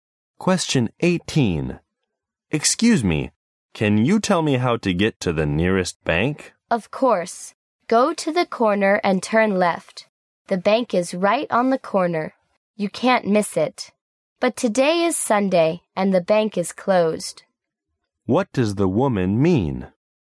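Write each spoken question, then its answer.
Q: What does the woman mean?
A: The bank is closed today because it is Sunday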